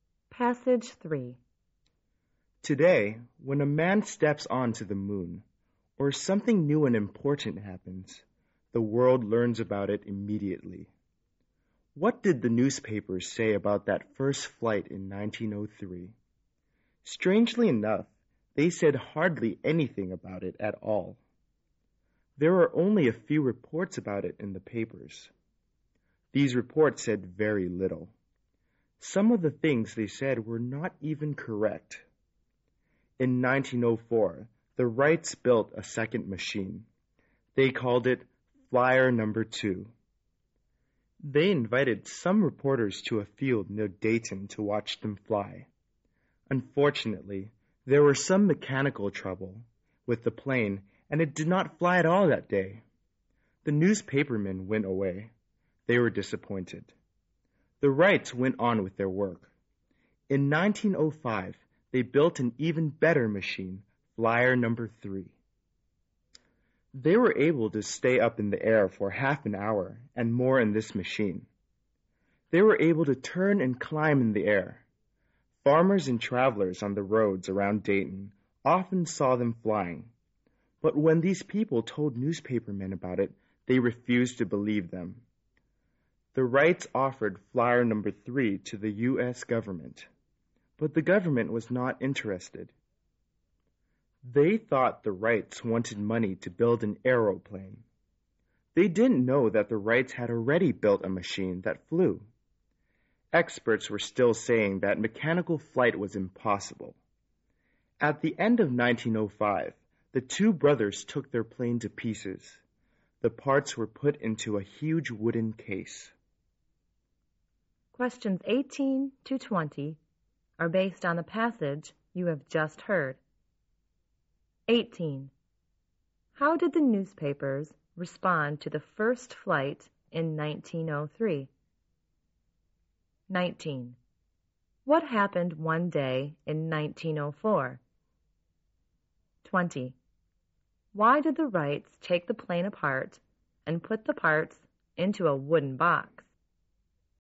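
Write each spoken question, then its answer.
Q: How did the newspapers respond to the first flight in 1903?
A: They said hardly anything about it.

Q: What happened one day in 1904?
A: Because of mechanical trouble, the plane did not fly in front of the invited reporters.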